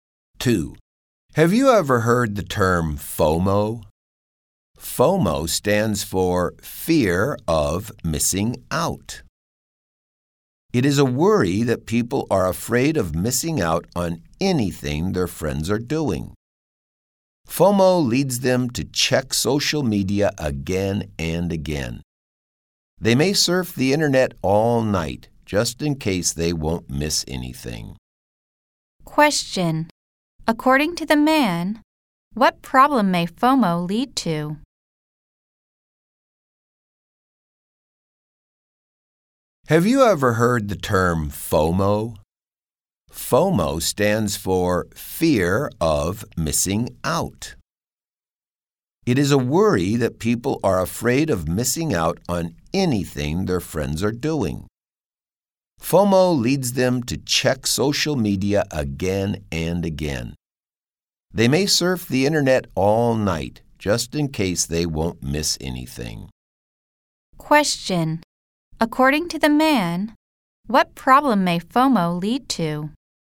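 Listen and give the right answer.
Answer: People may check social media again and again and surf the internet all night.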